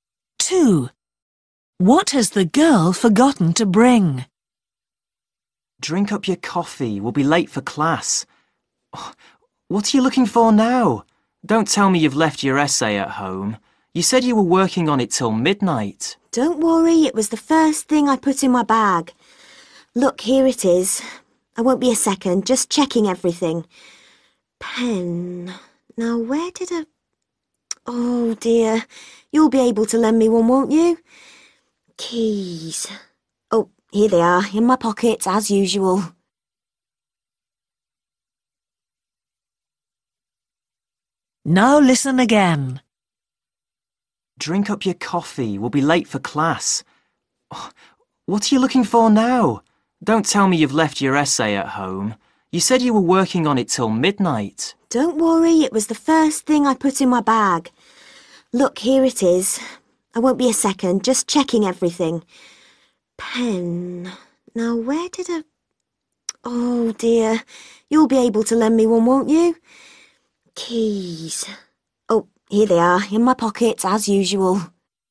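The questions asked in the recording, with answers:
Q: What has the girl forgotten to bring?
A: a pen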